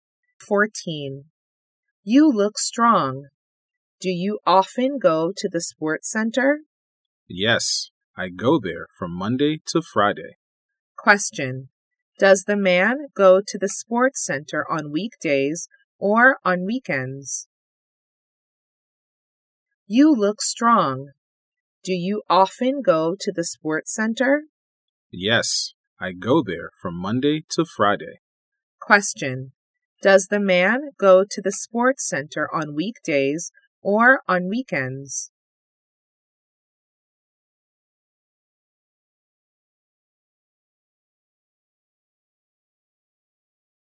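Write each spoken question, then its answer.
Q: Does the man go to the sports center on weekdays or on weekends?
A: On weekdays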